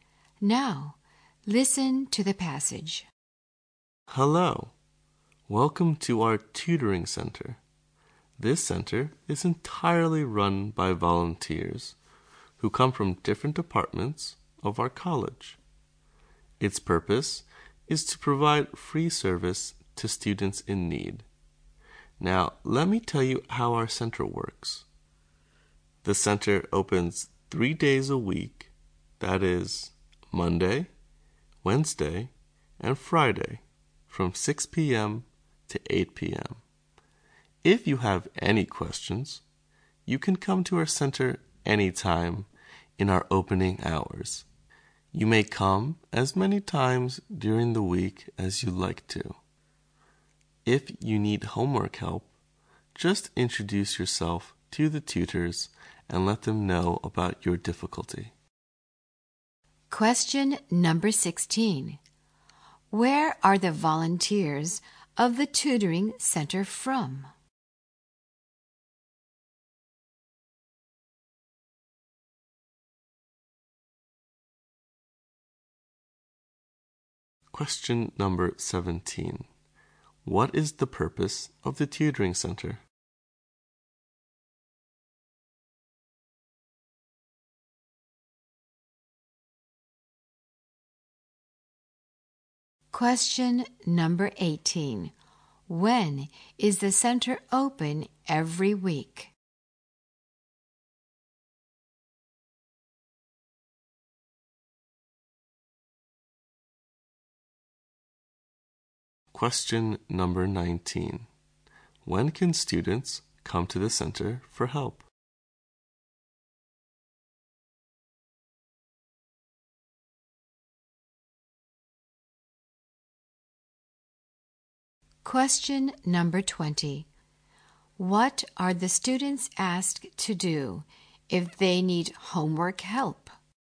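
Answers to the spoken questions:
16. Different departments of the college
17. To provide free service to students in need
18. Monday, Wednesday and Friday, 6 to 8 p.m.
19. Anytime during opening hours
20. Introduce themselves to the tutors and tell them their difficulty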